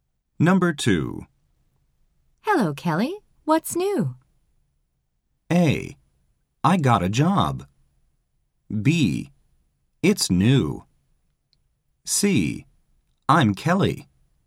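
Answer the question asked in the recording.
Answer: A: I got a job.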